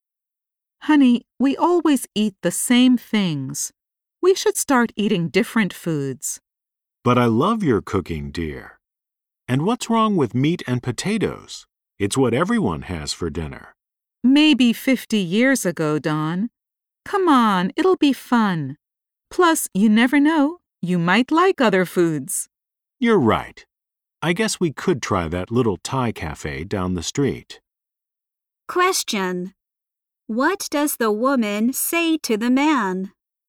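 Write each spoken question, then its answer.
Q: What does the woman say to the man?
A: They should start eating different foods.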